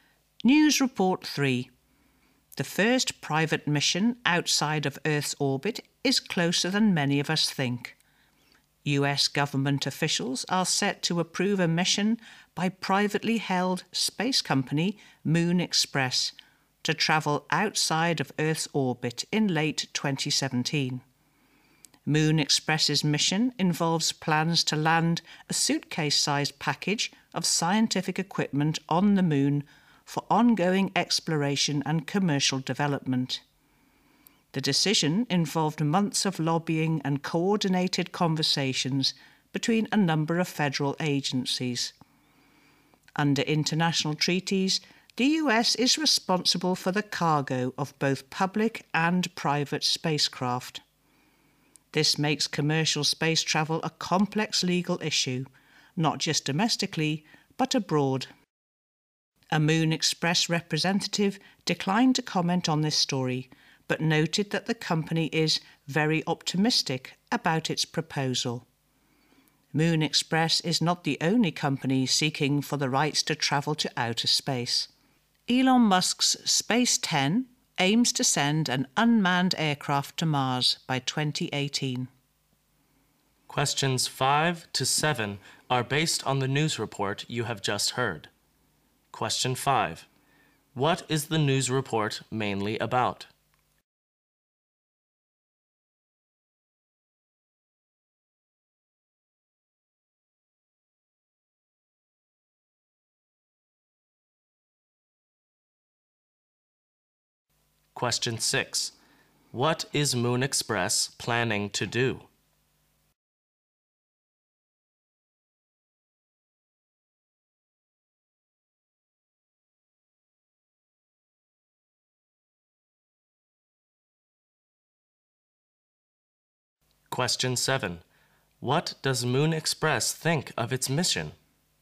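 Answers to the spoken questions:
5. The first private mission outside Earth's orbit
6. Land a package of scientific equipment on the Moon
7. It is very optimistic about it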